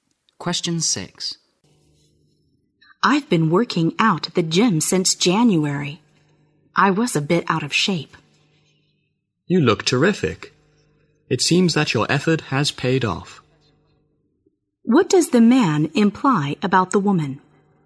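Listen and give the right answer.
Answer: Her workouts at the gym have paid off; she looks fit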